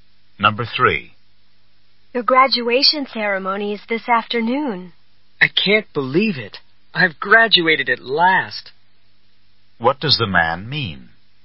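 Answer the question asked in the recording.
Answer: He can hardly believe he has finally graduated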